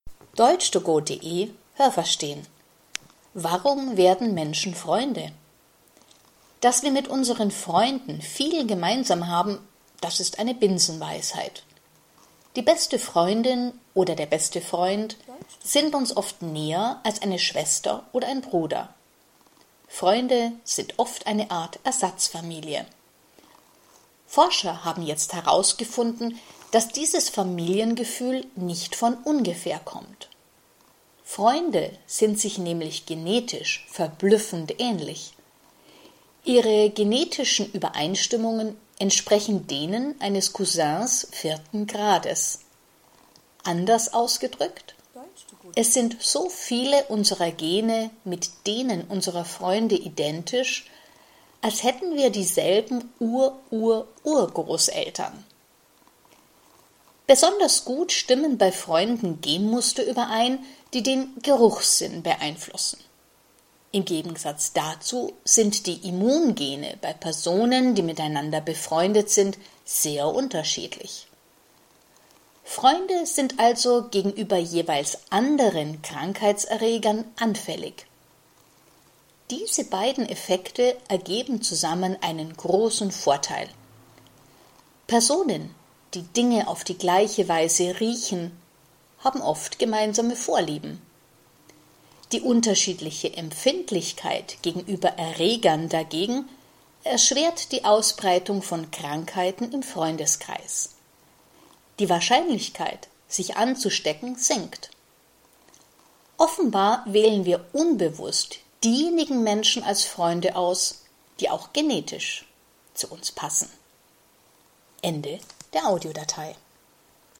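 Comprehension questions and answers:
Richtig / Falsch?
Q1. Menschen haben zu Familienmitgliedern immer eine engere Beziehung als zu Freunden.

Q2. Freunde haben dieselben Vorfahren, wissen das aber nicht.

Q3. Die Gene von Freunden ähneln sich, als hätten sie dieselben Ururgroßeltern.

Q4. Ist man mit jemandem befreundet, dann sind die Genmuster, die den Geruchssinn betreffen, besonders ähnlich.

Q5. Ist man mit jemandem befreundet, dann sind die Genmuster, die die Empfindlichkeit gegenüber Krankheiten regeln, ebenfalls besonders ähnlich.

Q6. Da die Immun-Gene bei Freunden sehr unterschiedlich sind, steckt man sich im Freundeskreis nicht so leicht an.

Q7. Anscheinend ist man mit Menschen befreundet, die genetisch zu einem passen.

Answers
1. Falsch
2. Falsch
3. Falsch
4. Richtig
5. Falsch
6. Richtig
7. Richtig

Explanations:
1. Manche haben zu Freunden eine engere Beziehung.
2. Sie haben ähnliche Gene, als wären sie verwandt.
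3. Die Gene ähneln sich, als hätten sie dieselben Urururgroßeltern.
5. Diese Genmuster sind besonders unterschiedlich.

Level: C (schwer)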